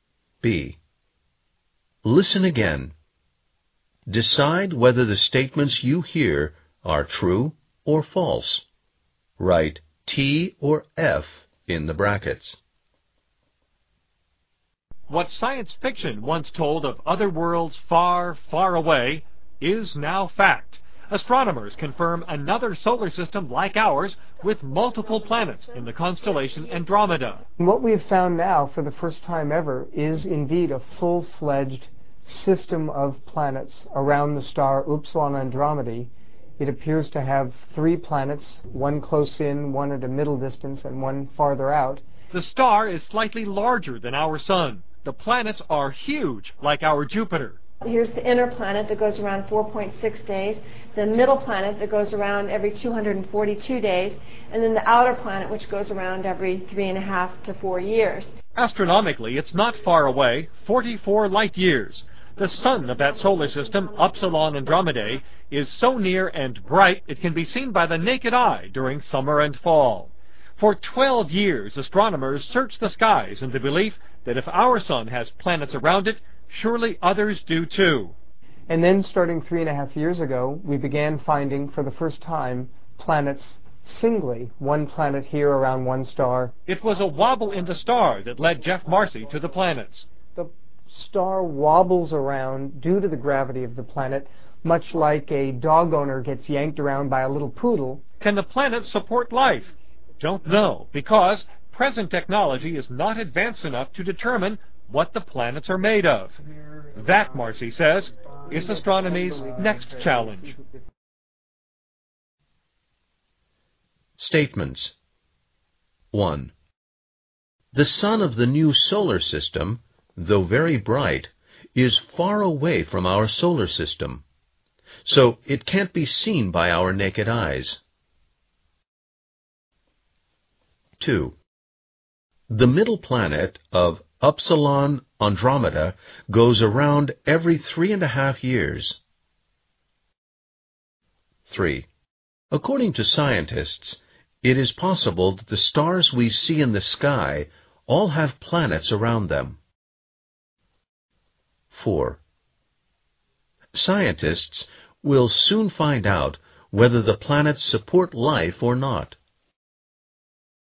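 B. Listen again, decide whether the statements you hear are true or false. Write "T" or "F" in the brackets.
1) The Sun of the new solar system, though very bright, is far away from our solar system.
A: F

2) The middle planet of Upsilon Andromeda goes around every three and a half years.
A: F

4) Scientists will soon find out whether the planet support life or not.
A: F

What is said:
What science fiction once told of other worlds far far away, is now fact.
Astronomers confirmed another solar system like ours with multiple planets in the constellation Andromeda.
What we've found now for the first time ever, is indeed a full-fledged system of plants around the star Upsilon Andromeda.
It appears to have three planets, one close in, one at a middle distance and one farther out.
The star is slightly larger than our Sun. The planet are huge like our Jupiter.
"Here is the inner planet that goes around 4.6 days.
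The middle planet that goes around every 242 days.
And then the outer planet which goes around every 3.5 to 4 years."
Astronomically it's not far away, 44 light years.
The Sun of that solar system, Upsilon Andromeda, is so near and bright, is can be seen by the naked eye during summer and fall.
For 12 years, astronomers searched the skies in the belief that if our Sun has planets arround it, surely others do, too.
And then starting 3.5 years ago, we began finding for the first time planets singly, one planet here around one star...
It was a wobble in the star that led Jeff Marcy to the planets.
So it can't be seen by our naked eyes.
2.
3. According to scientists, it's possible that the stars we see in the sky all have planets around them.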